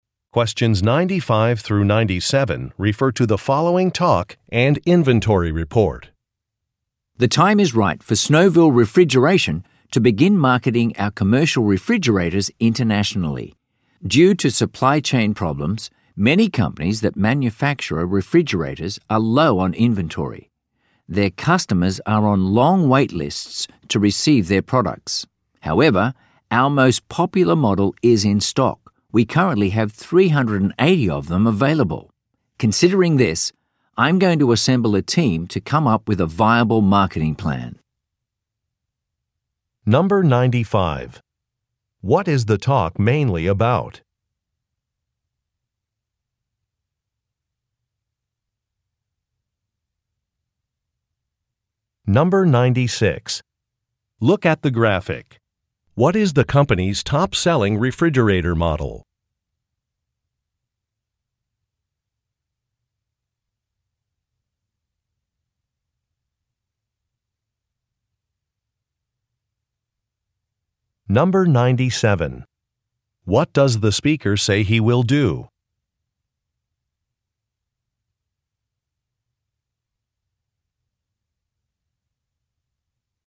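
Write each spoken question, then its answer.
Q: What is the talk mainly about?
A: Starting to market the company's commercial refrigerators internationally

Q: What does the speaker say he will do?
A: Put together a team to come up with a marketing plan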